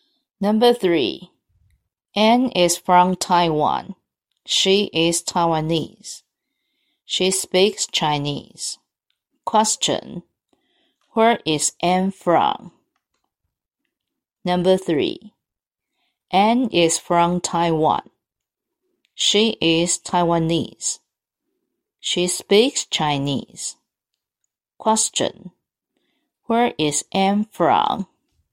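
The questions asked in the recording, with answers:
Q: Where is Anne from?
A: Taiwan.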